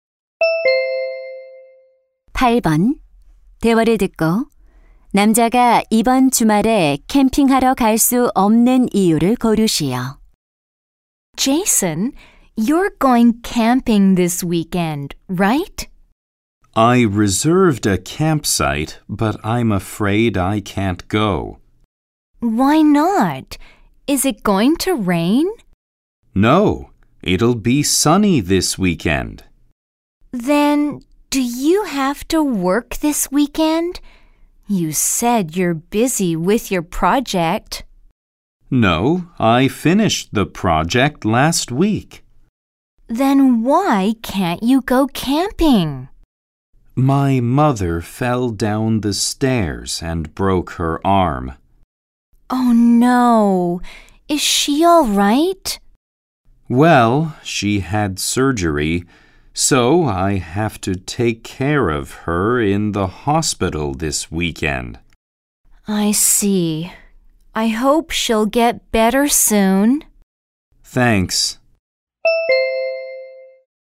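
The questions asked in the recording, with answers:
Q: 대화를 듣고 남자가 이번 주말에 캠핑하러 갈 수 없는 이유를 고르시오.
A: 병원에서 팔을 다친 어머니를 돌봐야 해서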